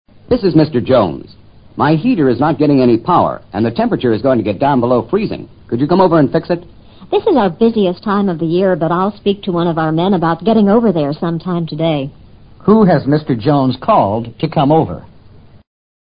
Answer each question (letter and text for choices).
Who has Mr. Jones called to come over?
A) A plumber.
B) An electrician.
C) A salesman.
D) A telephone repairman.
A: B) An electrician.

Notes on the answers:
my heater (加热器) is not getting any power 提供了足够做出判断的信息。power 通常指electric power (电力),修理电器自然是请电工。plumber 为管道工。